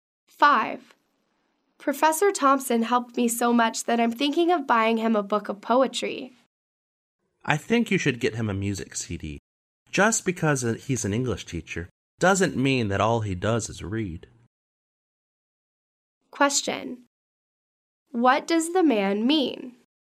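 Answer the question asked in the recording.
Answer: A music CD would be a better gift for the professor than a poetry book.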